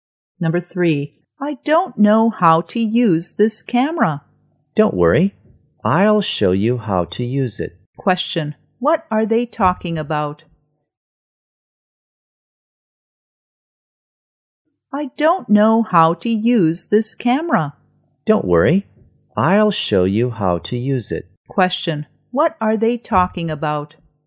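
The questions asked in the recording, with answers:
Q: what are they talking about?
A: How to use a camera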